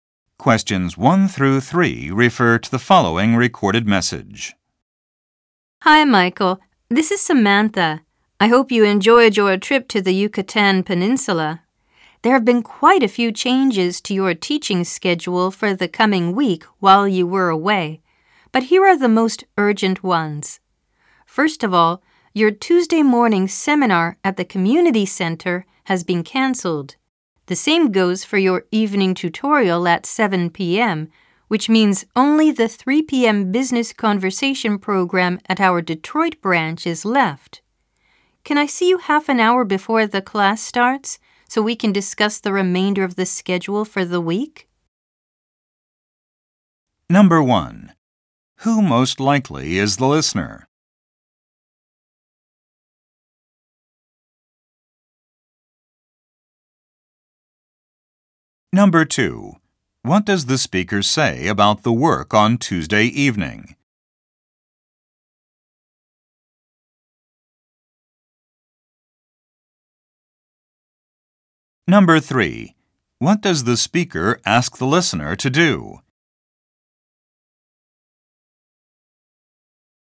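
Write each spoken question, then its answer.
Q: Who most likely is the listener?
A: A teacher

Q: What does the speaker say about the work on Tuesday evening?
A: The evening tutorial has been canceled

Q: What does the speaker ask the listener to do?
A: Meet half an hour before the class to discuss the schedule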